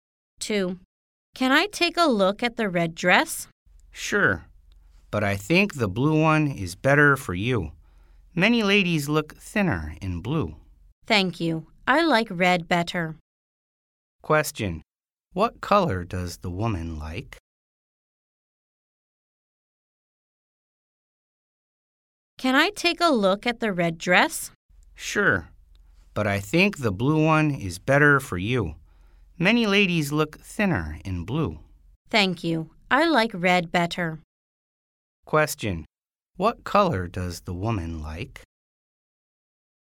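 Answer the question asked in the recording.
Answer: Red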